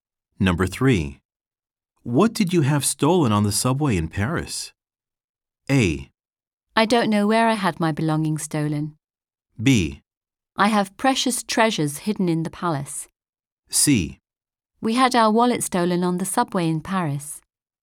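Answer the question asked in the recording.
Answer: C: We had our wallet stolen on the subway in Paris.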